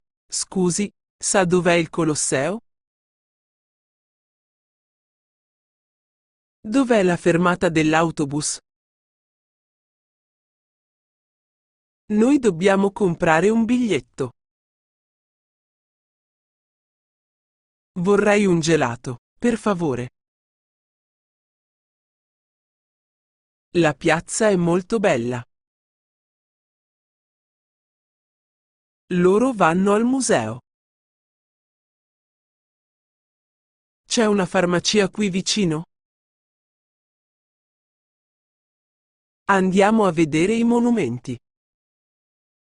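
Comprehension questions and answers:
Ascolta e scrivi le parole che mancano.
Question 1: Scusi, dov'è il Colosseo?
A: sa

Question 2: Dov'è la dell'?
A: fermata, autobus

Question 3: Noi comprare un .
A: dobbiamo, biglietto

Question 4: Vorrei un , per .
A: gelato, favore

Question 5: La è molto .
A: piazza, bella

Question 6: Loro al .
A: vanno, museo

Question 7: C'è una qui ?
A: farmacia, vicino

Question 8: Andiamo a i .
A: vedere, monumenti

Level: Livello A1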